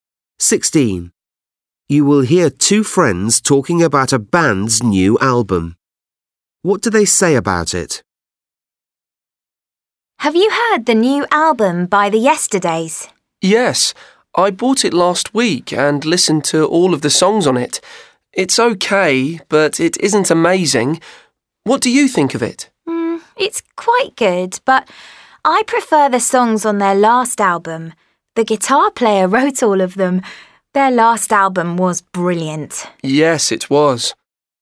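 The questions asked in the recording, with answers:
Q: What do they say about it?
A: It's okay, but not as good as their last album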